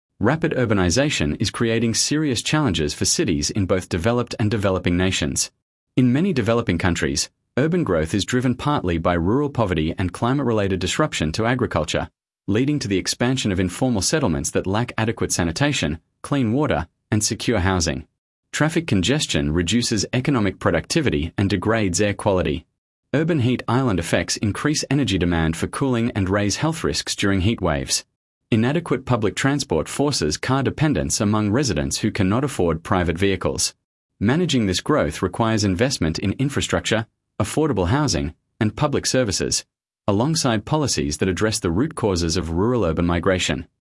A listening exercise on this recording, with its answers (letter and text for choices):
Select the paragraph that best summarises the recording.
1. Sample Text 1 — Urbanisation Challenges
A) A. Urbanisation is exclusively a problem for developing nations and does not affect high-income countries.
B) B. Rapid urbanisation brings economic opportunity but requires significant investment in infrastructure, housing, and services to avoid expanding poverty.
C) C. Urban populations are growing only in Asia and Africa and have stabilised in all other regions.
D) D. Smart city technology has already solved the main infrastructure challenges associated with rapid urban growth.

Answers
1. B) B. Rapid urbanisation brings economic opportunity but requires significant investment in infrastructure, housing, and services to avoid expanding poverty.